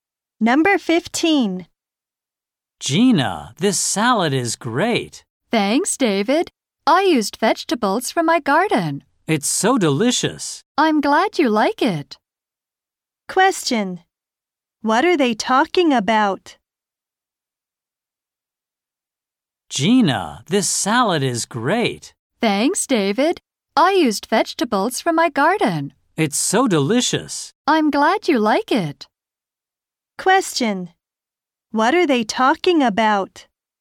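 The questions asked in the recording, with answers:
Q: What are they talking about?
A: Gina's salad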